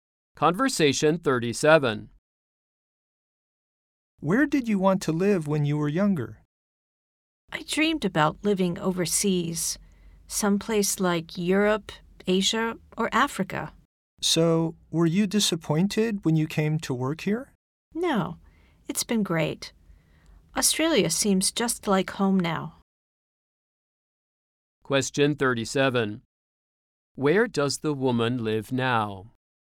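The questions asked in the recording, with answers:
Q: Where does the woman live now?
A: Australia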